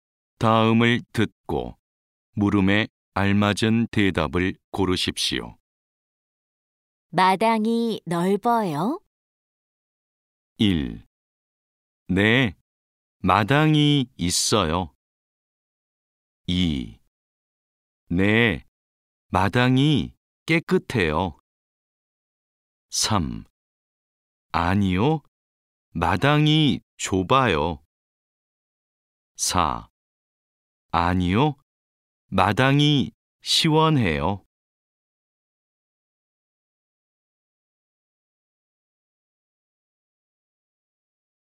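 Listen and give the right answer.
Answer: 3: 아니요, 마당이 좁아요.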